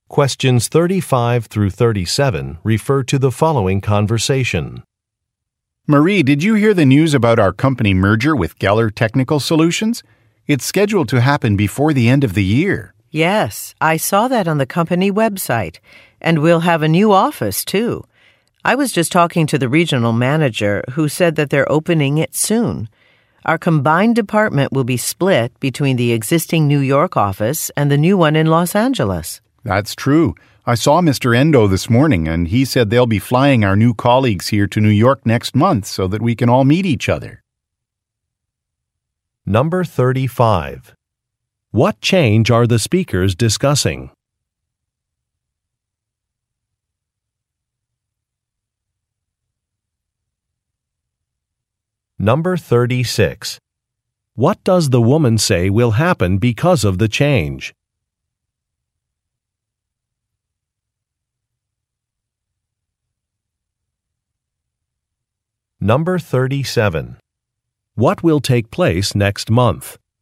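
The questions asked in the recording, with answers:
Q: What change are the speakers discussing?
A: A merger with Geller Technical Solutions

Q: What will take place next month?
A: New colleagues will be flown to New York to meet everyone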